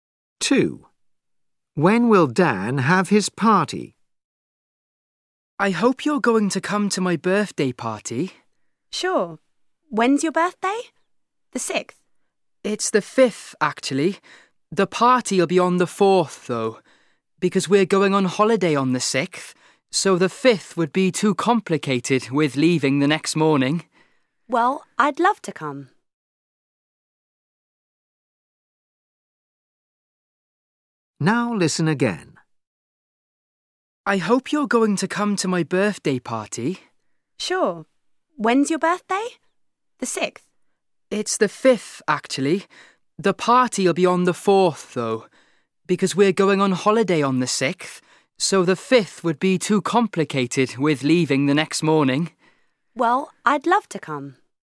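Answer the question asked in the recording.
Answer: on the 4th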